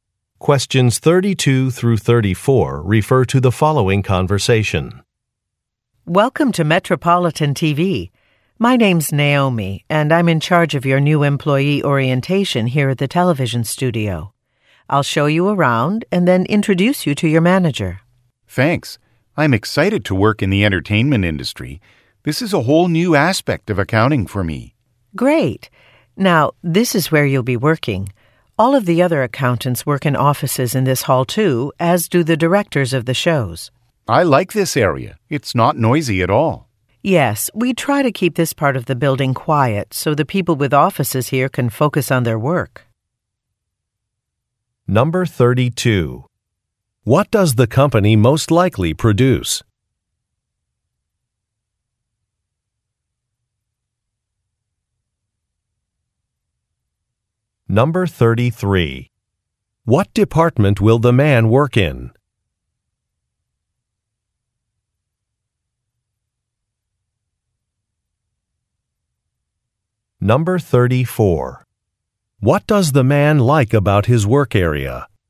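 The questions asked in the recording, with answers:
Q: What does the company most likely produce?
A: Television shows

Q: What department will the man work in?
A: Accounting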